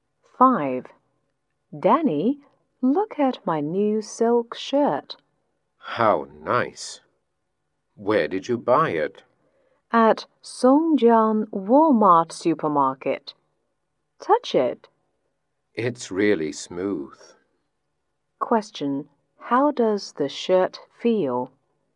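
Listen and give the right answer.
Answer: Smooth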